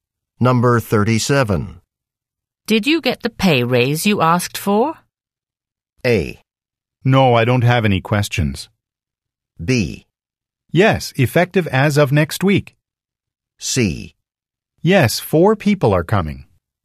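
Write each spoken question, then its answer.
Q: Did you get the pay raise you asked for?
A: B: Yes, effective as of next week.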